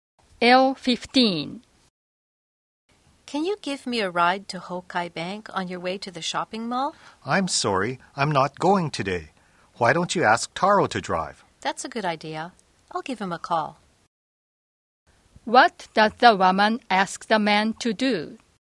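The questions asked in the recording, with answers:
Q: What does the woman ask the man to do?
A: Give her a ride to Hokai Bank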